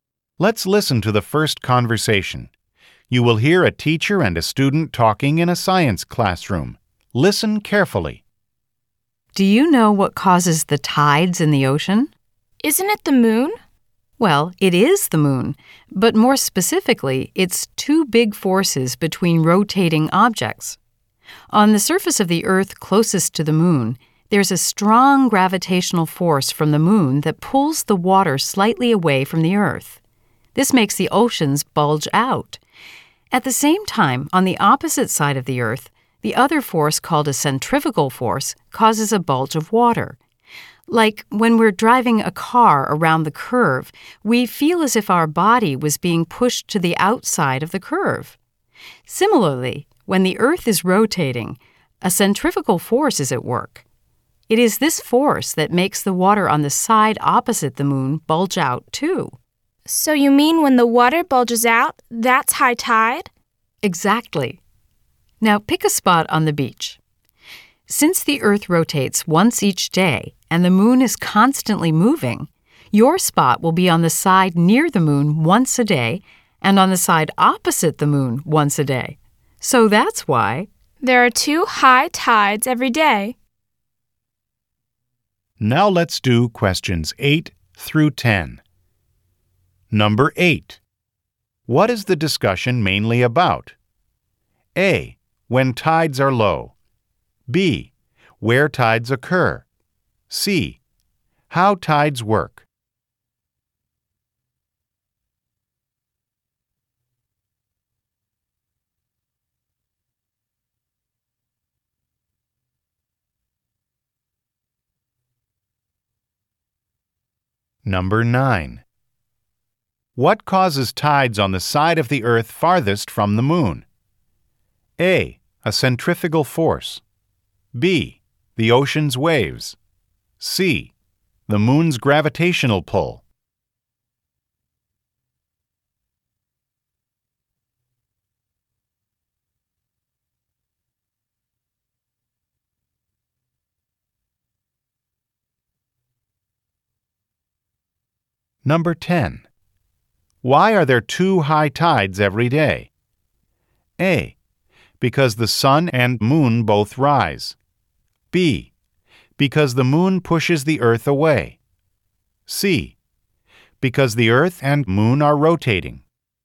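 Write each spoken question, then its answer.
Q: What is the discussion mainly about?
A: C: How tides work.

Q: What causes tides on the side of the Earth farthest from the moon?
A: A: A centrifugal force.

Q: Why are there two high tides every day?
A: C: Because the Earth and moon are rotating.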